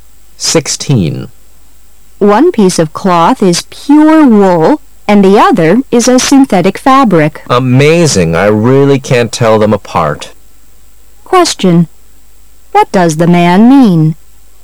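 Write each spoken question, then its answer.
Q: What does the man mean?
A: He can't tell the two fabrics apart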